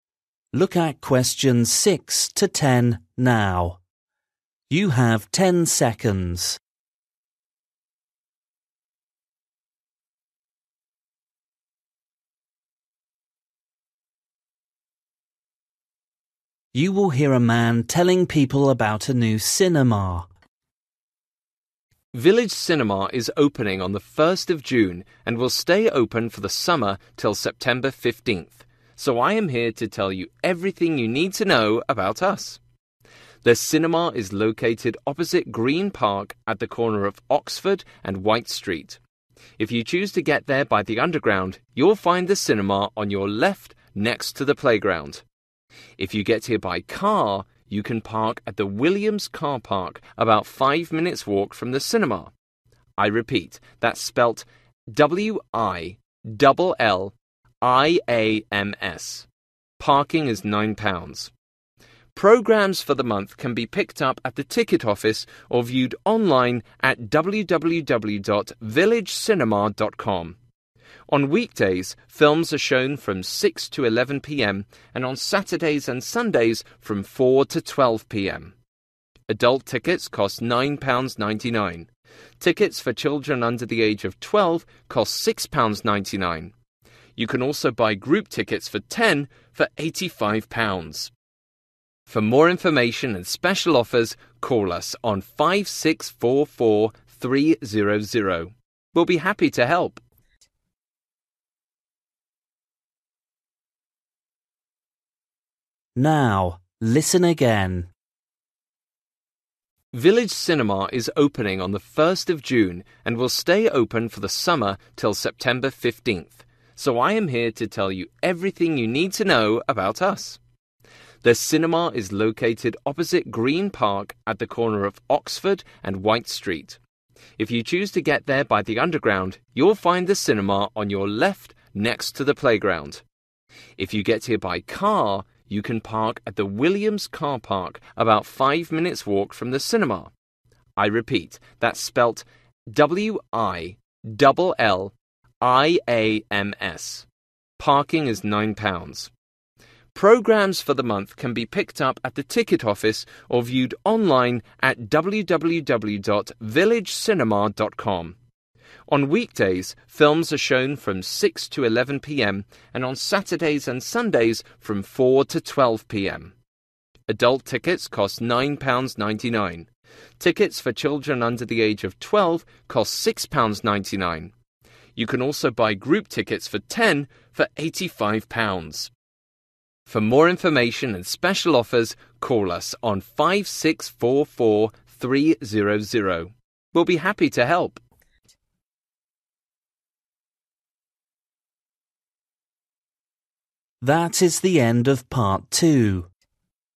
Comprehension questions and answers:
For each question, write the correct answer in the gap. Write one word or a number or a date or a time.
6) next to the (6) ........................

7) (7) ........................ car park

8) at (8) ........................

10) (10) ........................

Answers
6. playground
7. Williams
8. 12.00
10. 5644300

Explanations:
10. For more information and special offers call us on 5644300. We'll be happy to help.

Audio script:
M: Village Cinema is opening on the 1st of June and will stay open for the summer still September 15th. So I am here to tell you everything you need to know about us.
The cinema is located opposite Green Park at the corner of Oxford and White Street. If you choose to get there by the underground (6) you'll find the cinema on your left next to the playground. If you get here by car, (7) you can park at the Williams car park about 5 minutes' walk from the cinema. I repeat, that's spelt: W-I-DOUBLE L-I-A-M-S. Parking is £9.00
Programmes for the month can be picked up at the ticket office or viewed online at www.villagecinema.com. On weekdays, films are shown from 6 to 11.00 pm and (8) on Saturdays and Sundays from 4 to 12.00 pm. Adult tickets cost £9.99. (9) Tickets for children under the age of 12 cost £6.99. You can also buy group tickets for 10 for £85.
(10) For more information and special offers call us on 5644300. We'll be happy to help.

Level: KET (A2)